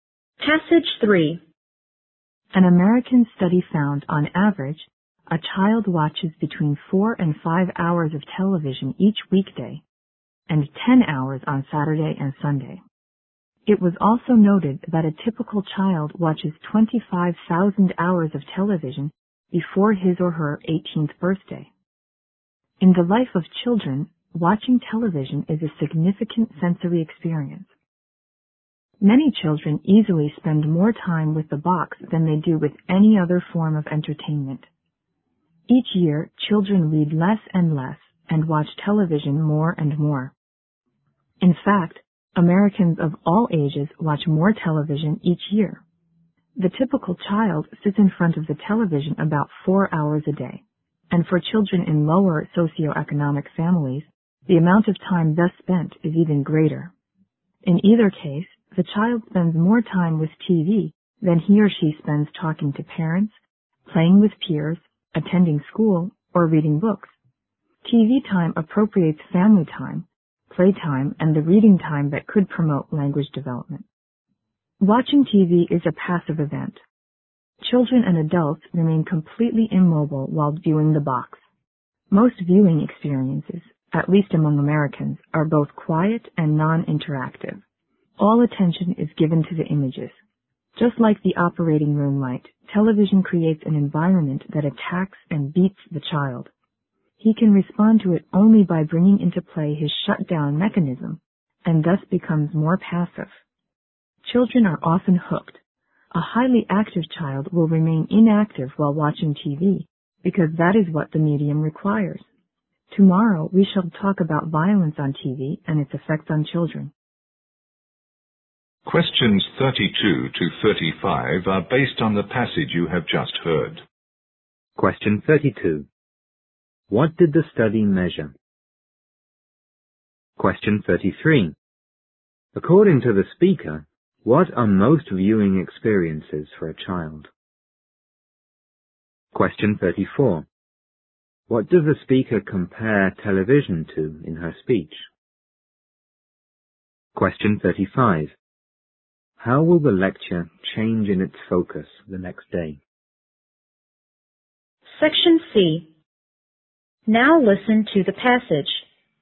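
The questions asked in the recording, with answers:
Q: What did the study measure?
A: How much time children spend watching television

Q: According to the speaker, what are most viewing experiences for a child?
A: Quiet and non-interactive

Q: What does the speaker compare television to in her speech?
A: An operating room light

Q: How will the lecture change in its focus the next day?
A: It will focus on violence on TV and its effects on children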